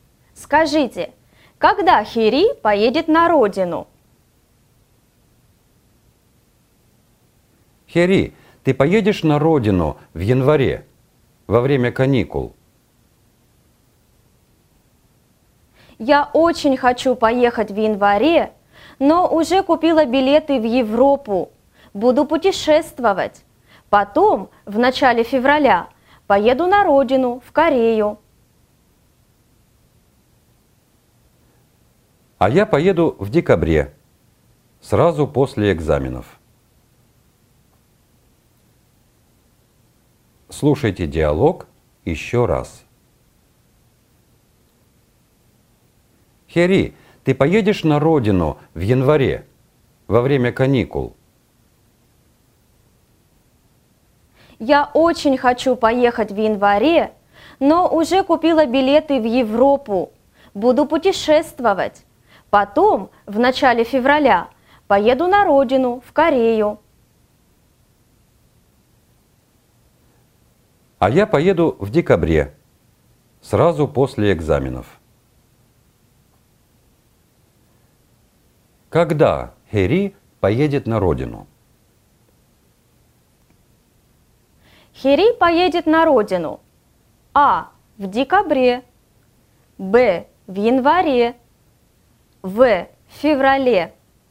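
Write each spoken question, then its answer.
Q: Когда Хери поедет на родину?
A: В: В феврале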